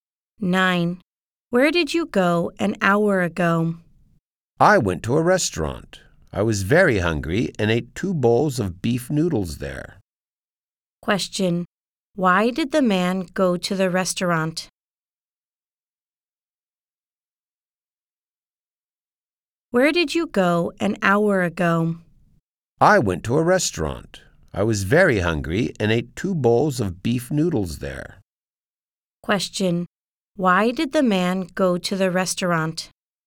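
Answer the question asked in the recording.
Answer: He was very hungry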